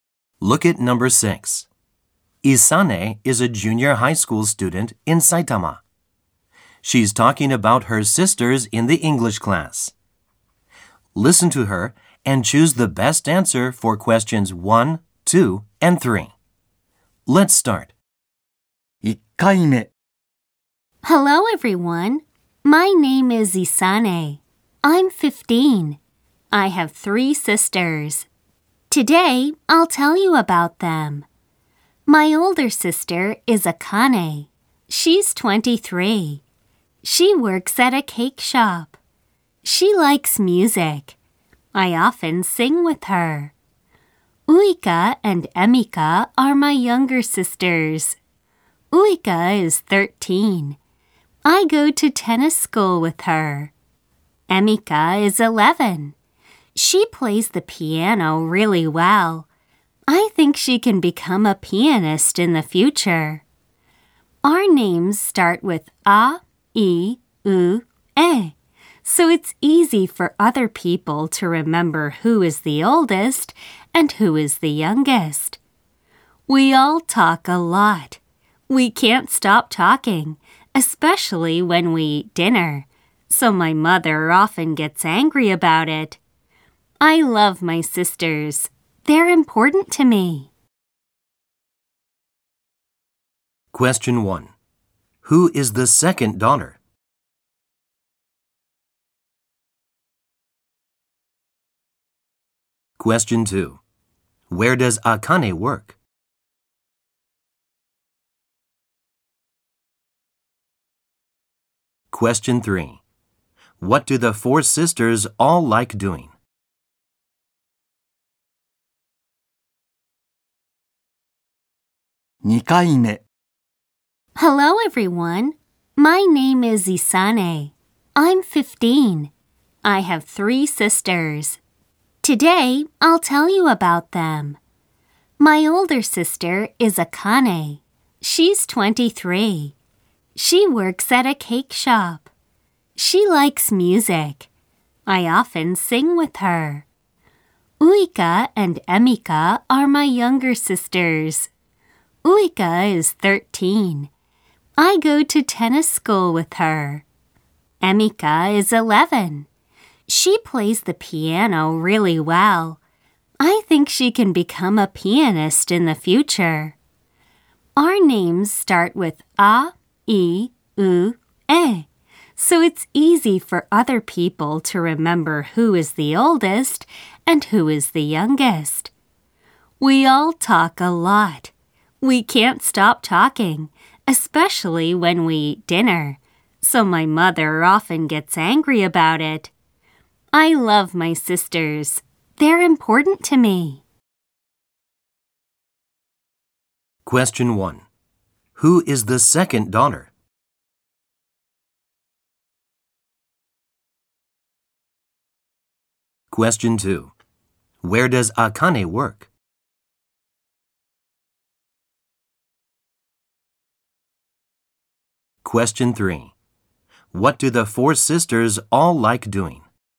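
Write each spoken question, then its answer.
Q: Who is the second daughter?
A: Isane

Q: Where does Akane work?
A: At a cake shop

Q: What do the 4 sisters all like doing?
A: Talking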